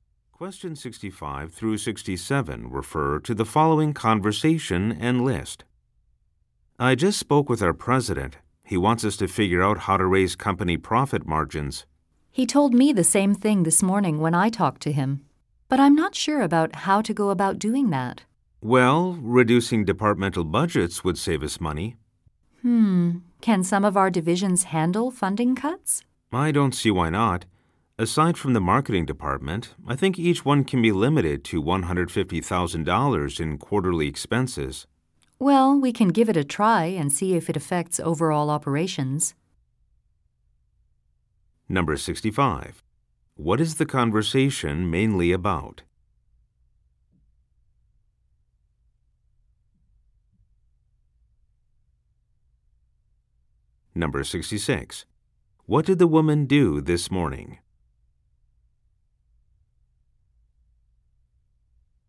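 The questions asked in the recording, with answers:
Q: What is the conversation mainly about?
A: How to raise company profit margins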